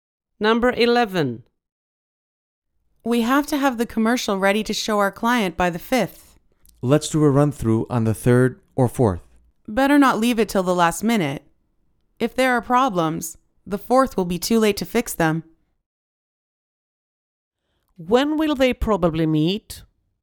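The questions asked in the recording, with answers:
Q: When will they probably meet?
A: On the 3rd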